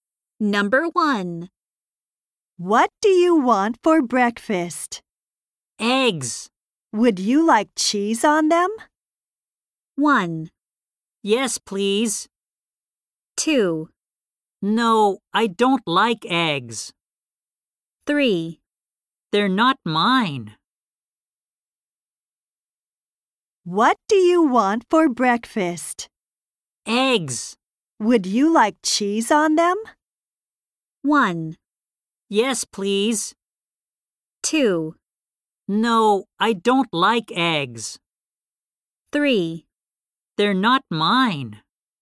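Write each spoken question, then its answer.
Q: Would you like cheese on them?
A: 1: Yes, please.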